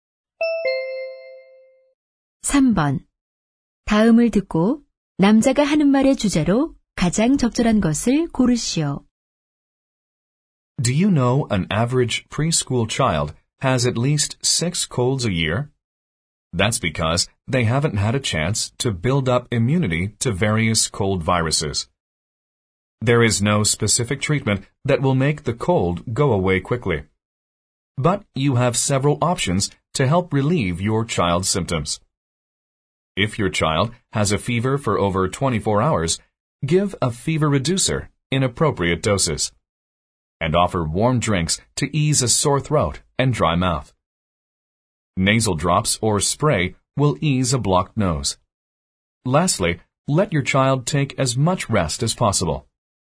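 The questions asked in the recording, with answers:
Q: 다음을 듣고 남자가 하는 말의 주제로 가장 적절한 것을 고르시오.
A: 아이의 감기 증상을 완화하는 방법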